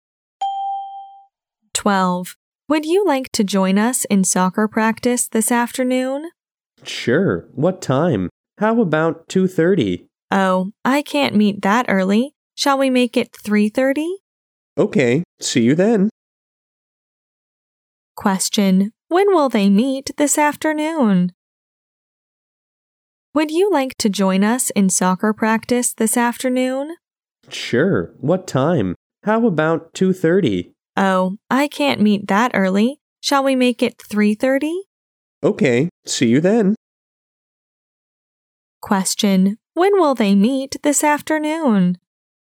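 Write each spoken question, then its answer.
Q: Question: when will they meet this afternoon?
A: At 3:30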